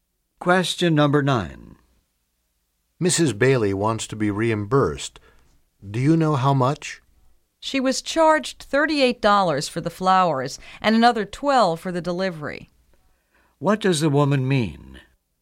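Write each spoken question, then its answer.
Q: What does the woman mean?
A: Mrs. Bailey should be reimbursed $50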